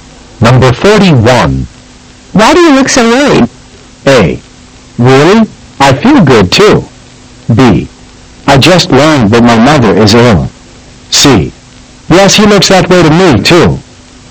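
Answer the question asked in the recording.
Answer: B: I just learned that my mother is ill.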